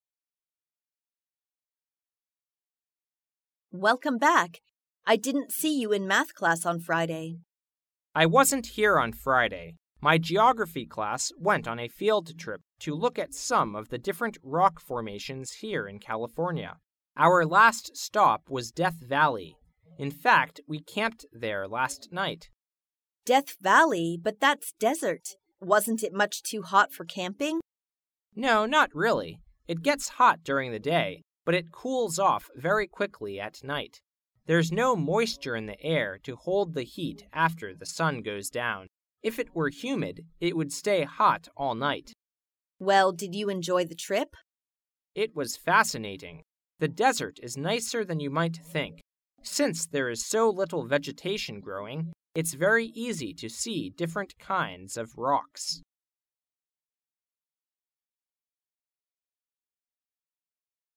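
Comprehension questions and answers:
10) What was the woman doing on Friday?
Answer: Participating in a special class activity.

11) What had the man assumed about Death Valley?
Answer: It would be too hot for camping.

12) Why does the woman think that the desert is a good place to visit?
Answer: Rock formations are clearly visible.

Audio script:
A
[听力原文] 14-17 W: Welcome back! I didn't see you in math class on Friday. M: I wasn't here on Friday. My geography class went on a field trip to look at some of the different rock formations here in California. Our last stop was Death Valley. In fact, we camped there last night. W: Death Valley! But that's desert! Wasn't it much too hot for camping? M: No, not really. It gets hot during the day, but it cools off very quickly at night. There's no moisture in the air to hold the heat after the sun goes down. If it were humid, it would stay hot all night. 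W: Well, did you enjoy the trip? M: It was fascinating. The desert is nicer than you might think. Since there is so little vegetation growing, it's very easy to see different kinds of rocks.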